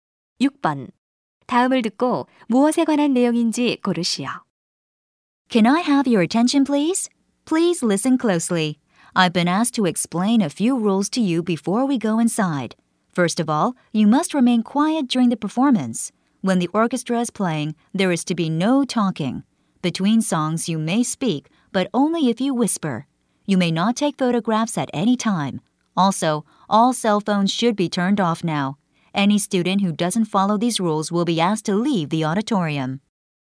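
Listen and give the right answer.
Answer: 오케스트라 공연 관람 규칙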